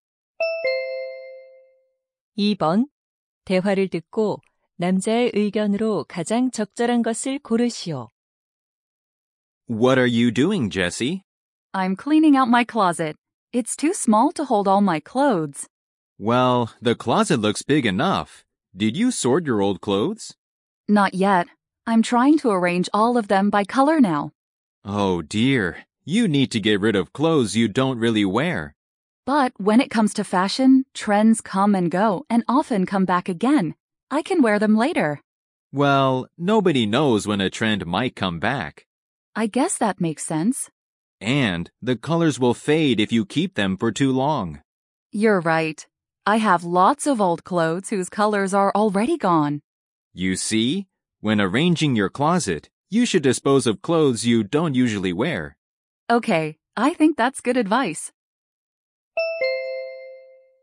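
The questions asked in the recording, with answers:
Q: 대화를 듣고 남자의 의견으로 가장 적절한 것을 고르시오.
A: 옷장을 정리할 때 잘 입지 않는 옷은 처분해야 한다.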